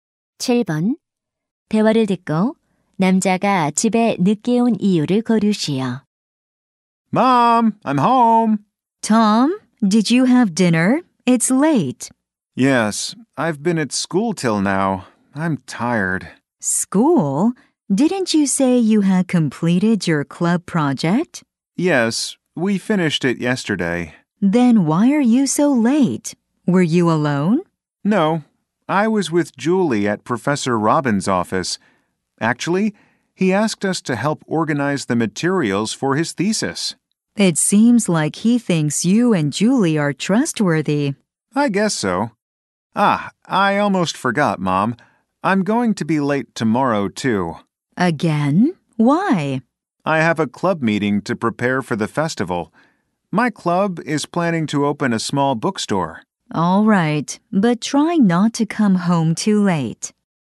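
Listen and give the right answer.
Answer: 교수님의 논문 자료 정리를 도와서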